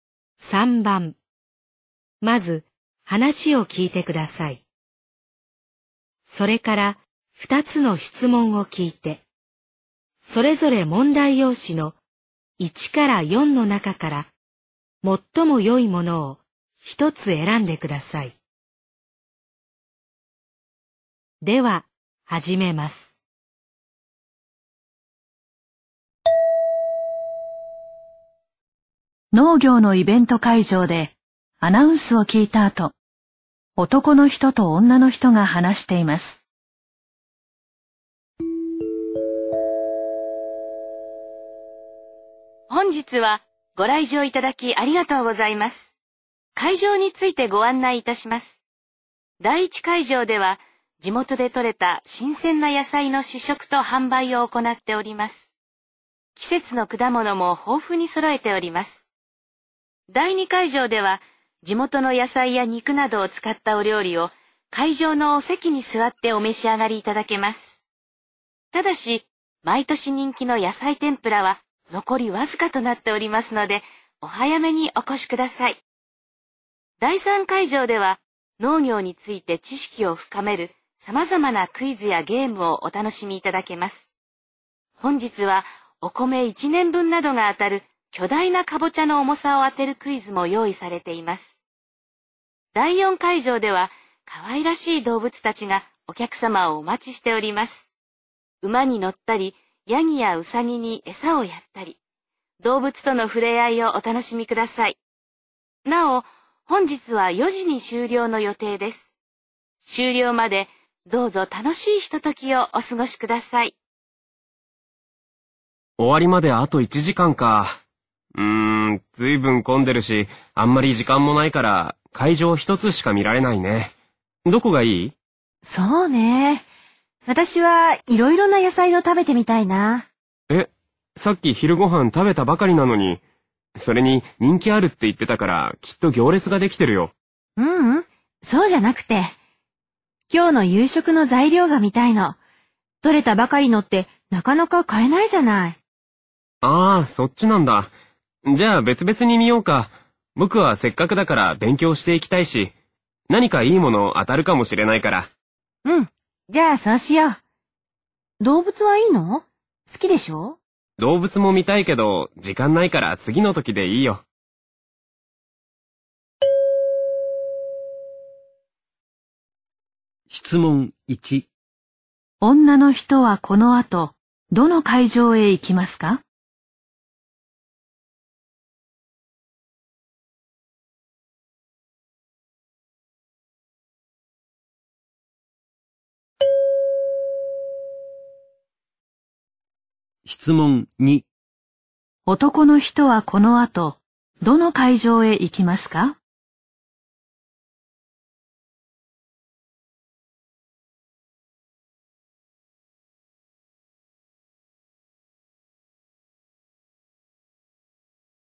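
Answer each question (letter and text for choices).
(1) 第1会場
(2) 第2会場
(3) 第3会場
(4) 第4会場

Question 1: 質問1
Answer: (1) 第1会場

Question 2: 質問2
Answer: (3) 第3会場

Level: N2 Listening · Test 13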